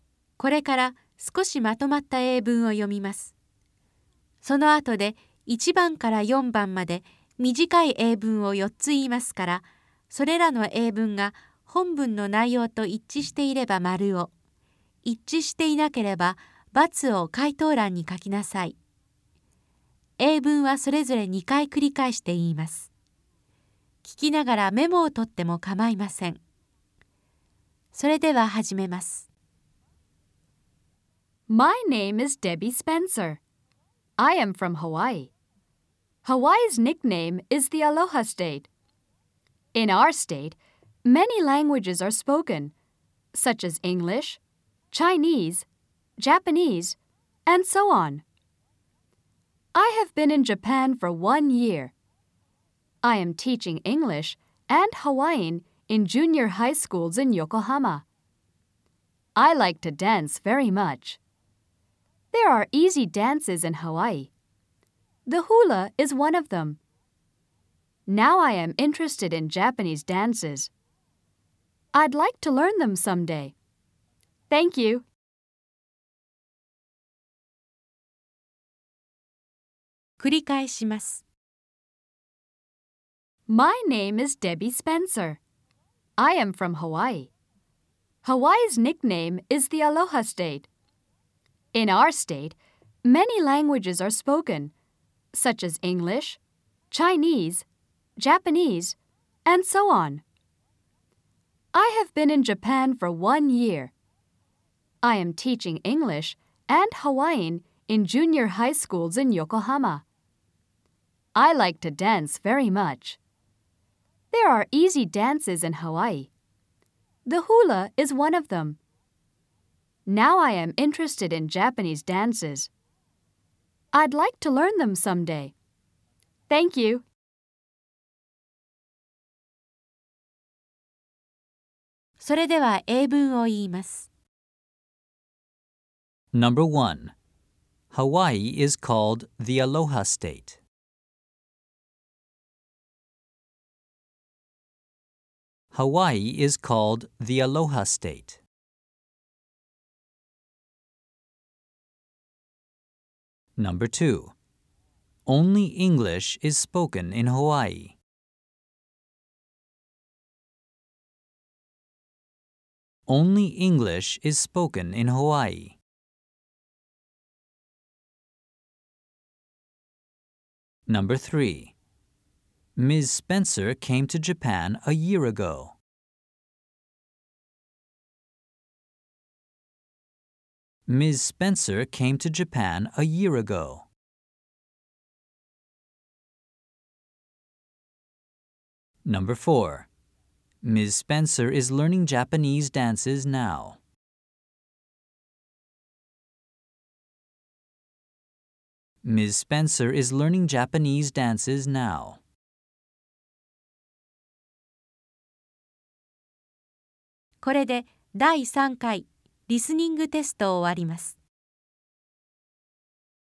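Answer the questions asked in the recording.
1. ○ (true)
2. × (false)
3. ○ (true)
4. × (false)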